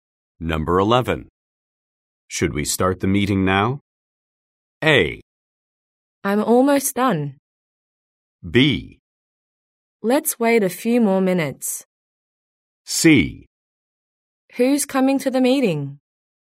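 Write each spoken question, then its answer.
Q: Should we start the meeting now?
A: B: Let's wait a few more minutes.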